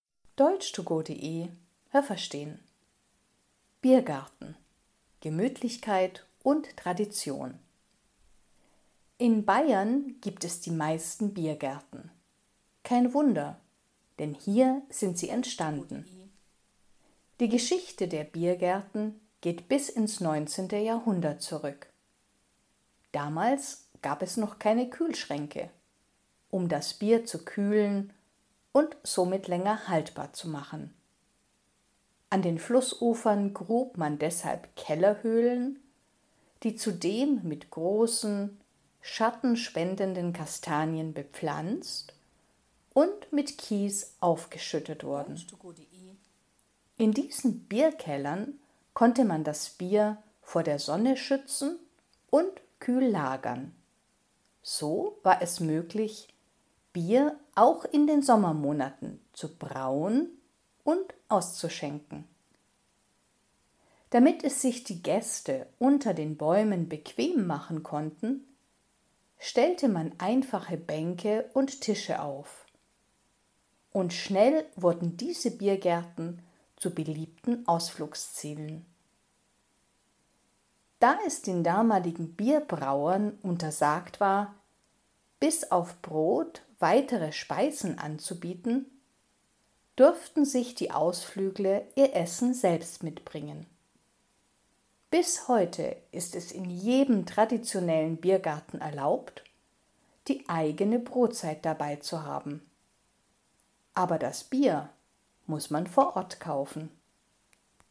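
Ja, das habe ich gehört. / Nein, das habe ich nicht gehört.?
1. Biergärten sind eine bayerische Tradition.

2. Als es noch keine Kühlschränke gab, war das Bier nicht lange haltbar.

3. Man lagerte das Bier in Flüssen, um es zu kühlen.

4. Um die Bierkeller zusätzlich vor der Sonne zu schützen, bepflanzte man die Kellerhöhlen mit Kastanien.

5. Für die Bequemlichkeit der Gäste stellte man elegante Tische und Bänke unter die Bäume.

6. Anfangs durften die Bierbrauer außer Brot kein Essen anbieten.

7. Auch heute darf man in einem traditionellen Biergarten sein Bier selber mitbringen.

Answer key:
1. Ja, das habe ich gehört.
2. Ja, das habe ich gehört.
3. Nein, das habe ich nicht gehört.
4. Ja, das habe ich gehört.
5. Nein, das habe ich nicht gehört.
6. Ja, das habe ich gehört.
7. Nein, das habe ich nicht gehört.

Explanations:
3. Man lagerte es in Bierkellern an Flussufern.

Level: B2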